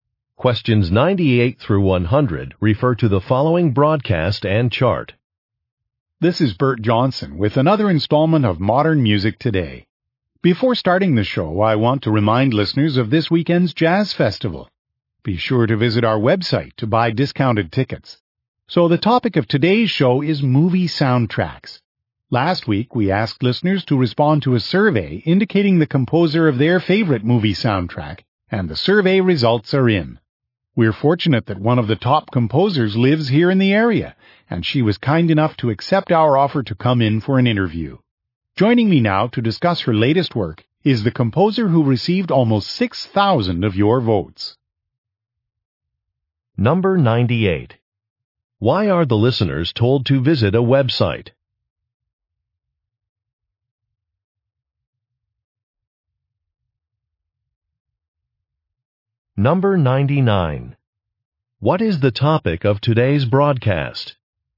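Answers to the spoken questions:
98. To buy discounted jazz festival tickets
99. Movie soundtracks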